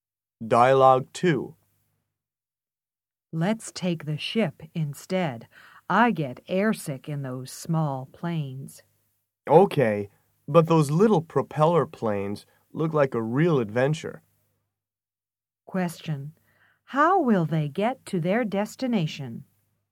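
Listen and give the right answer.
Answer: By ship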